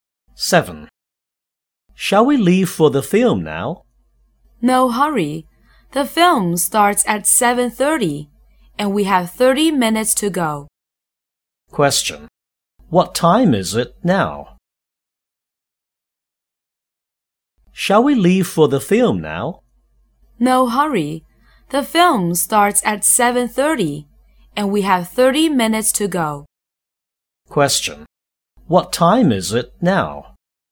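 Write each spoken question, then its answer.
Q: What time is it now?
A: 7:00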